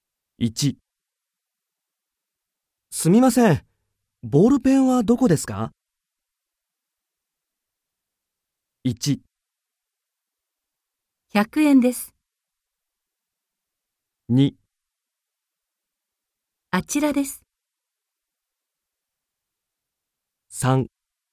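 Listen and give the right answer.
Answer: 2: あちらです。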